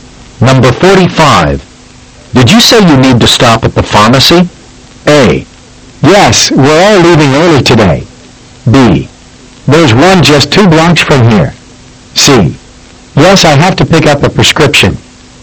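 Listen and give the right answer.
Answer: C: Yes, I have to pick up a prescription.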